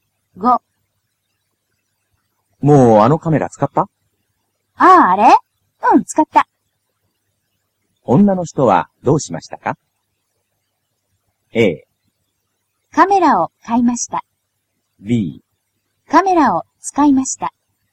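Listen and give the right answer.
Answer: B: カメラを使いました。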